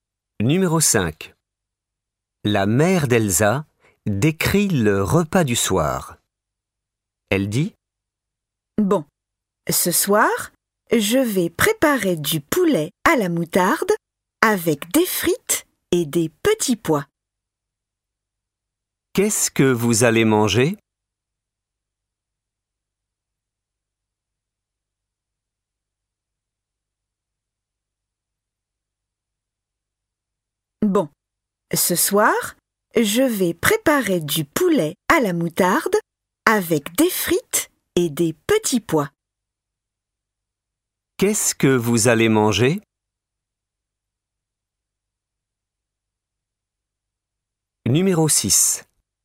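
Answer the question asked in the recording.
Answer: Du poulet à la moutarde avec des frites et des petits pois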